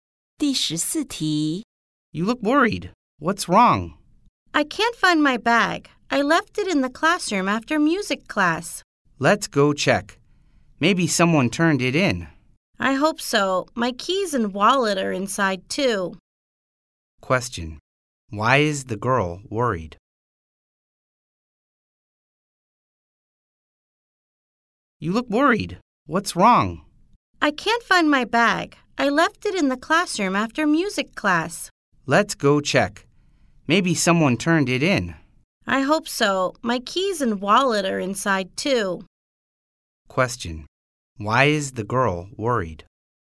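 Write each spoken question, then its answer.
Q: Why is the girl worried?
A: She can't find her bag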